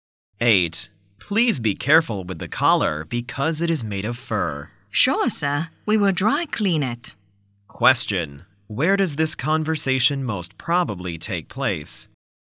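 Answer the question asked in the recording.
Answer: At a dry cleaner's.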